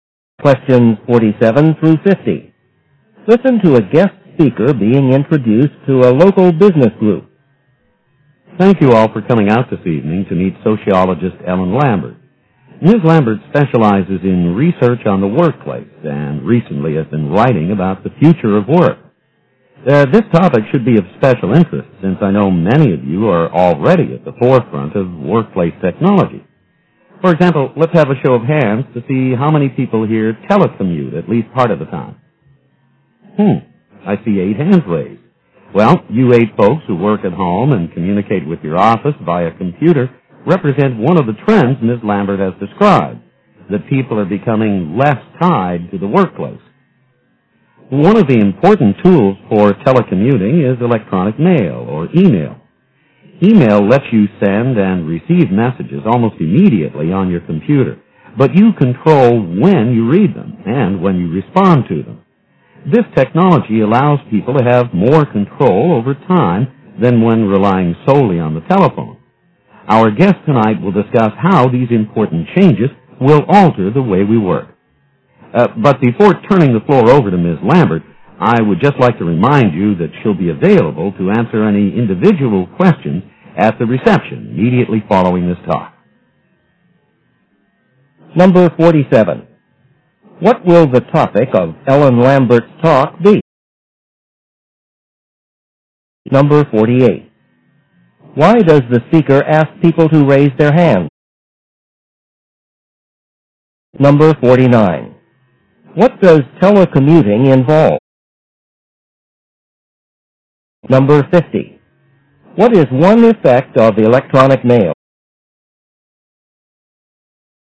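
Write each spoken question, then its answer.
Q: What will the topic of Ellen Lambert's talk be?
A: The future of work

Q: Why does the speaker ask people to raise their hands?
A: To see how many of them telecommute

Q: What does telecommuting involve?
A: Working at home and communicating with the office by computer

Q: What is one effect of electronic mail?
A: People have more control over their time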